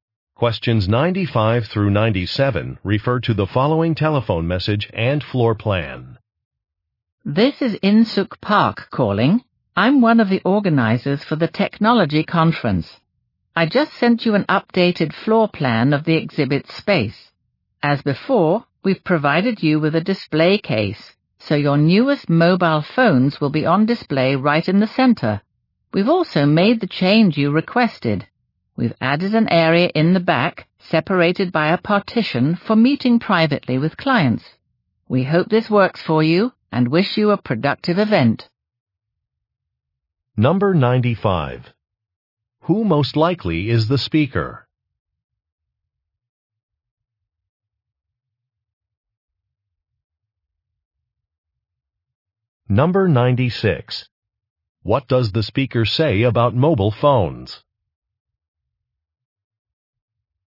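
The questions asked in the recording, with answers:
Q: Who most likely is the speaker?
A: A conference organizer

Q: What does the speaker say about mobile phones?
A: They will be displayed in the center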